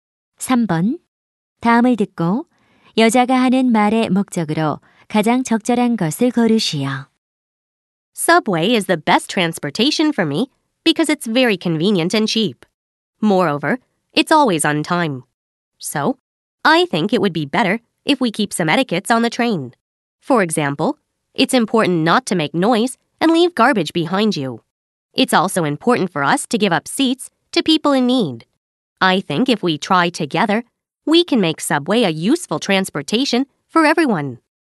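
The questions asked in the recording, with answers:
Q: 다음을 듣고 여자가 하는 말의 목적으로 가장 적절한 것을 고르시오.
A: 지하철 예절을 지키자고 당부하려고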